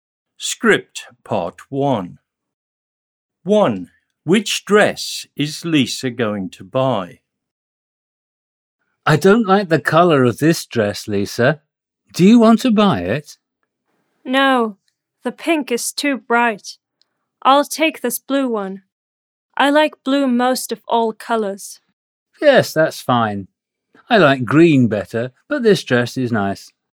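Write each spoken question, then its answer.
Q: Which dress is Lisa going to buy?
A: the blue one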